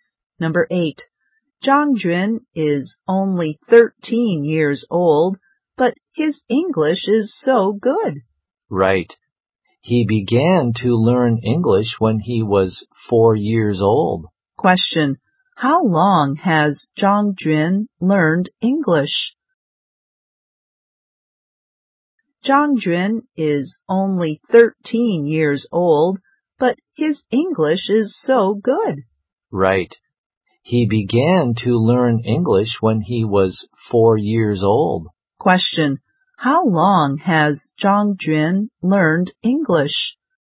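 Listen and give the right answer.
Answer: For nine years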